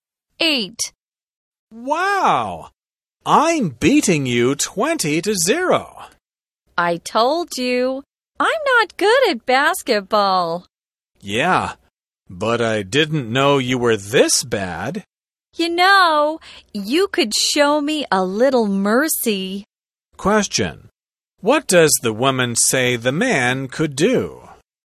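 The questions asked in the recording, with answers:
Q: What does the woman say the man could do?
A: Show her a little mercy.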